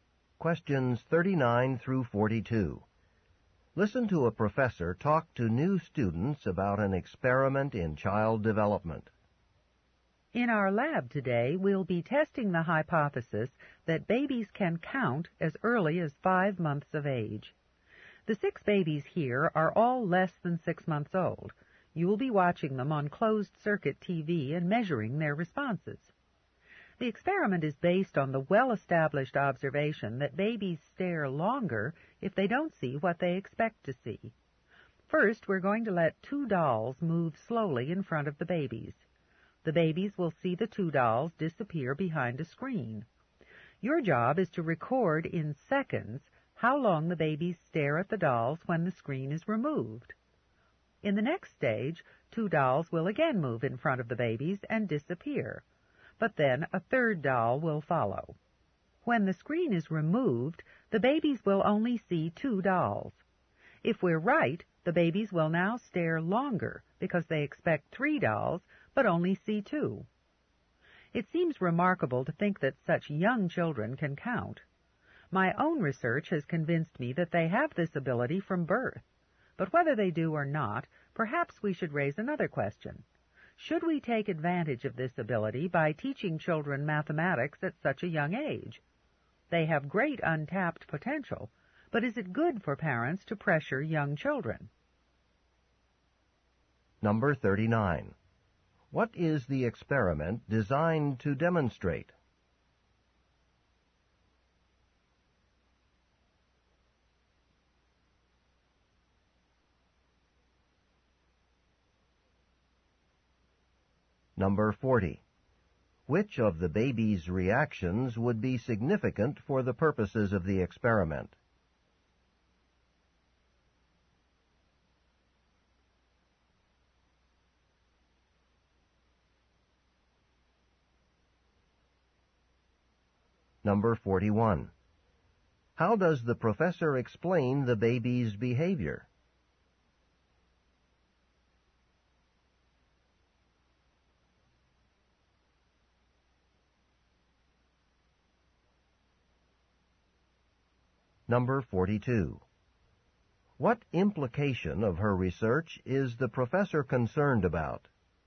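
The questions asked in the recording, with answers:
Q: What is the experiment designed to demonstrate?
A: That babies can count at about five months old.

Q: Which of the baby's reactions would be significant for the purposes of the experiment?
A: How long the babies stare when the screen is removed.

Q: How does the professor explain the baby's behavior?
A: Babies stare longer when they don't see what they expect.

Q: What implication of her research is the professor concerned about?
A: Parents might pressure young children to learn math.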